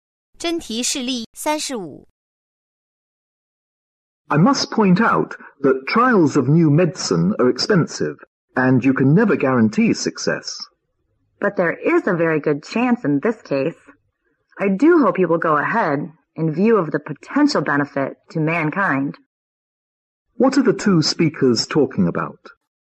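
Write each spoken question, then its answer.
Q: What are the two speakers talking about?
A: Whether to go ahead with a trial of a new medicine.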